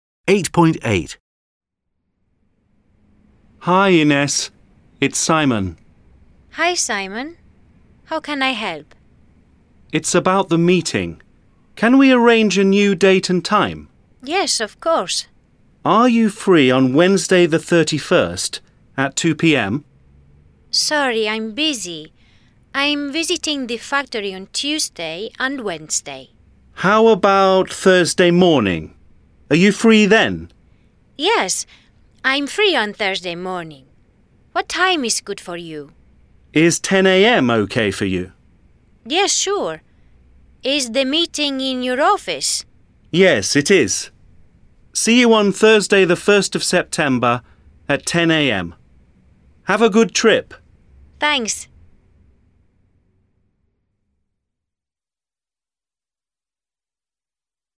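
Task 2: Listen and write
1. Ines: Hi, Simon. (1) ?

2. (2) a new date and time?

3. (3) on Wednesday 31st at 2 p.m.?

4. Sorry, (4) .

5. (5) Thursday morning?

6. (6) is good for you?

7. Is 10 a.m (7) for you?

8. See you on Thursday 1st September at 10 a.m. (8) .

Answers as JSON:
{"1": "How can I help", "2": "Can we arrange", "3": "Are you free", "4": "I'm busy", "5": "How about", "6": "What time", "7": "okay", "8": "Have a good trip"}

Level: A0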